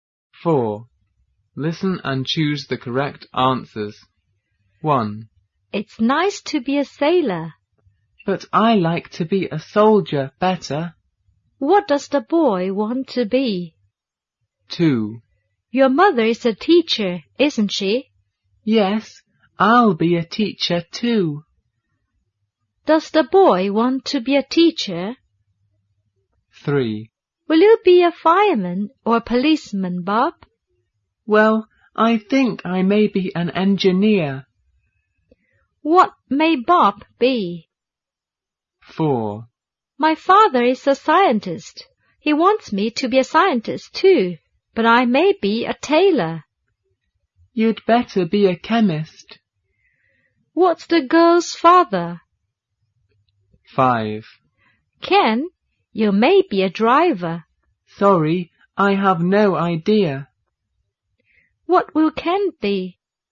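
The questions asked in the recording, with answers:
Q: What does the boy want to be?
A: A soldier

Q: Does the boy want to be a teacher?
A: Yes, he does

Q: What may Bob be?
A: An engineer

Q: What's the girl's father?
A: A scientist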